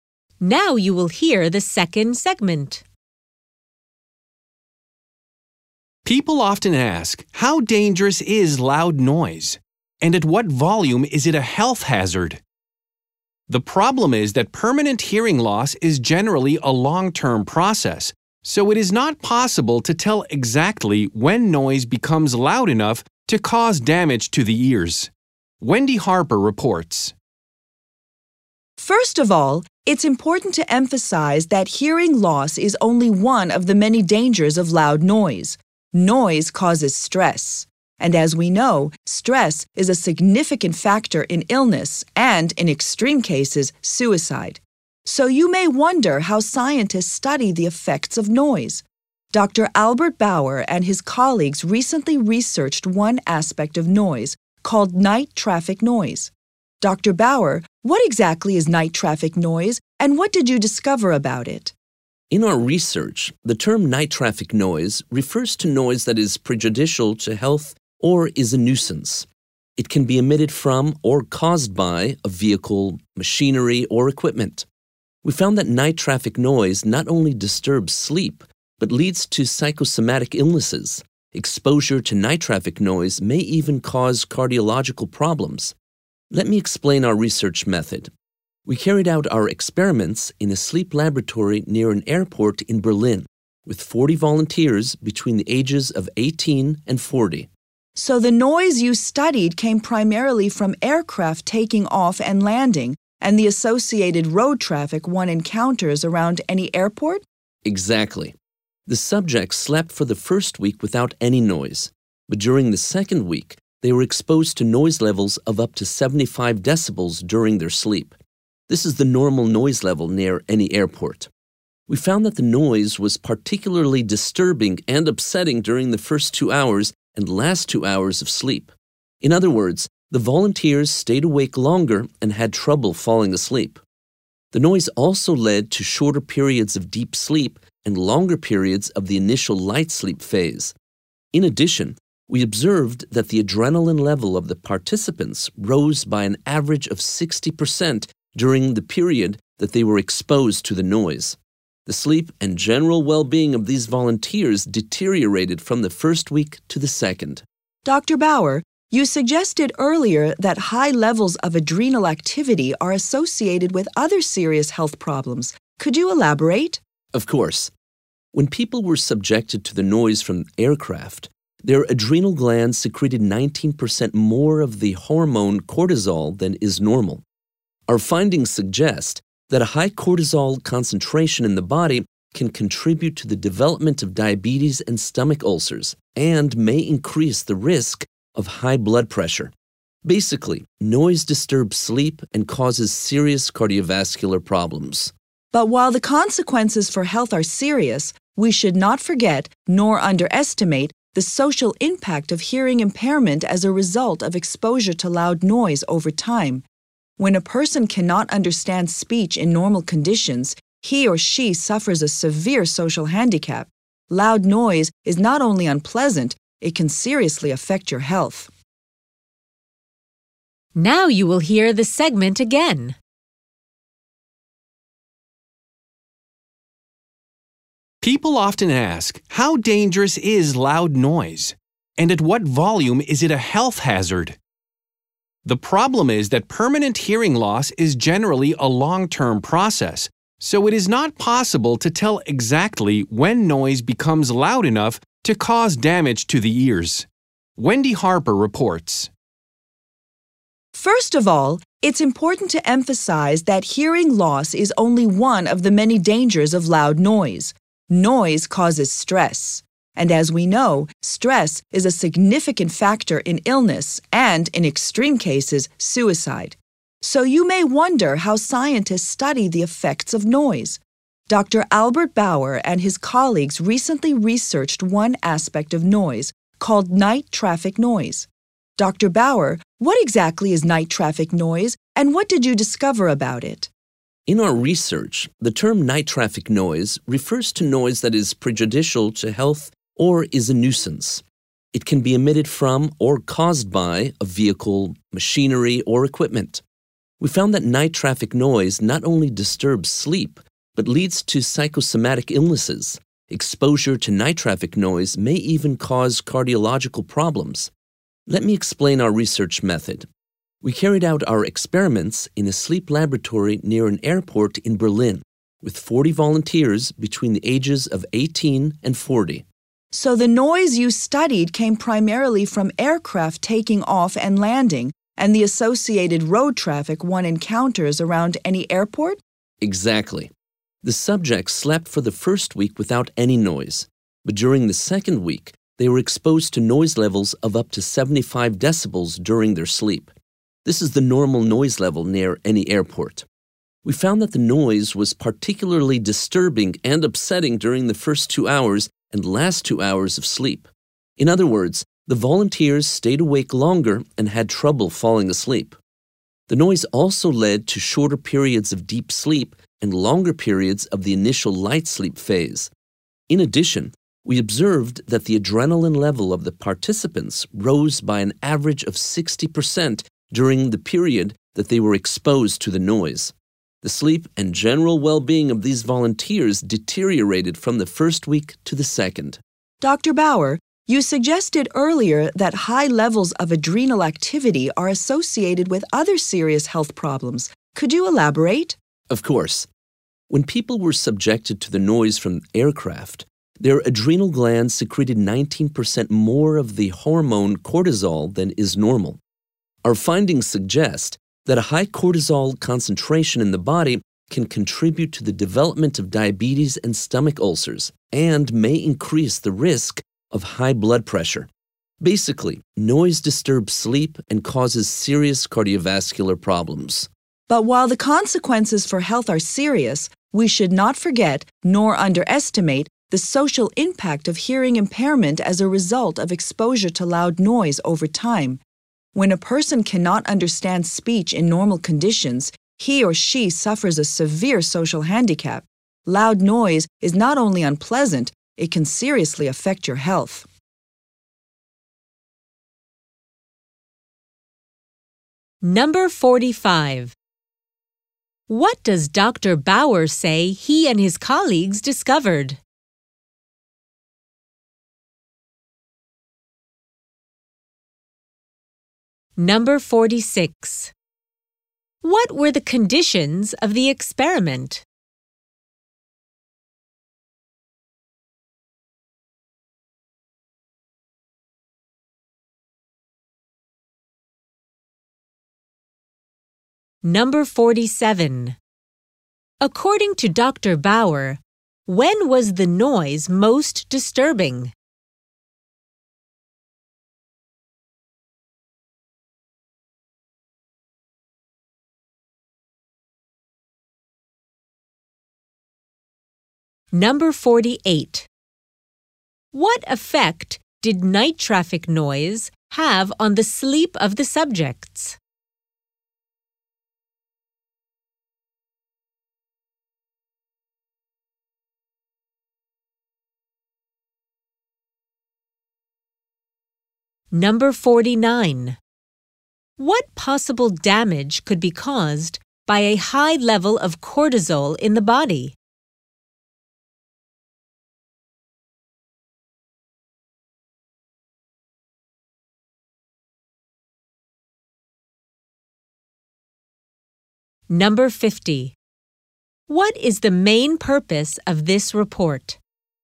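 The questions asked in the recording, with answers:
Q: What does Dr. Bauer say he and his colleagues discovered?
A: Night traffic noise disturbs sleep and leads to psychosomatic illnesses, maybe even heart problems

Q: What were the conditions of the experiment?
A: 40 volunteers aged 18–40 slept in a lab near a Berlin airport: one week without noise, then one week with noise up to 75 decibels

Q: According to Dr. Bauer, when was the noise most disturbing?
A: During the first two hours and the last two hours of sleep

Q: What effect did night traffic noise have on the sleep of the subjects?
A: They stayed awake longer and had shorter periods of deep sleep

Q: What possible damage could be caused by a high level of cortisol in the body?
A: Diabetes, stomach ulcers and a higher risk of high blood pressure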